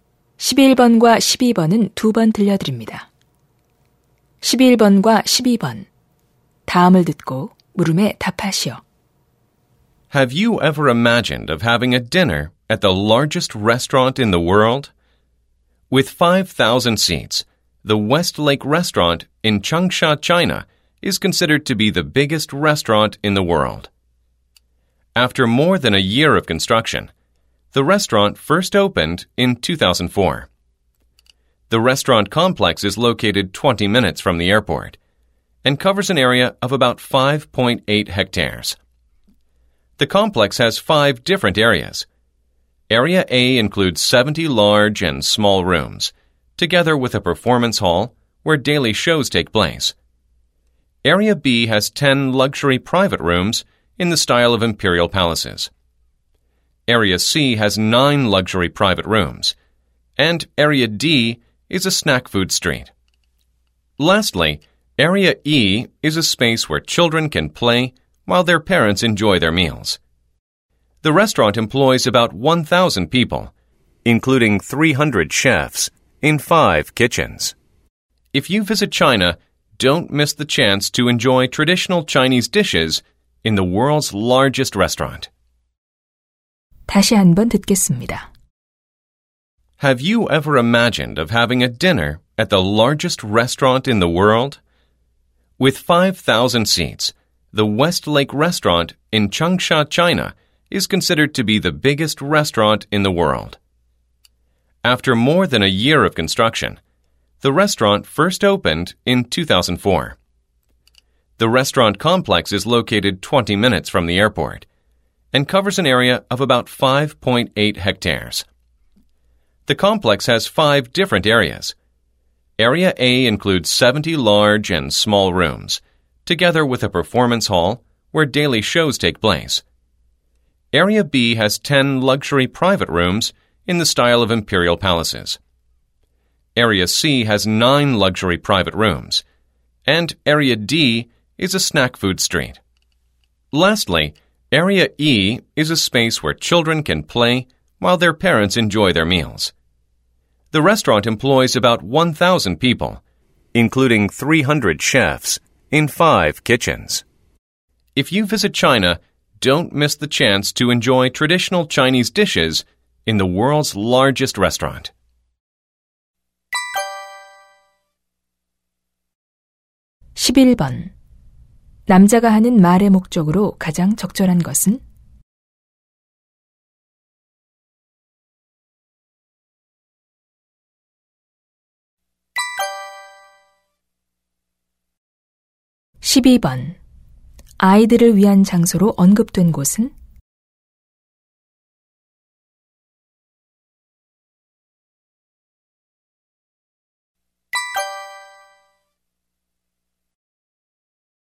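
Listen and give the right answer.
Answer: Area E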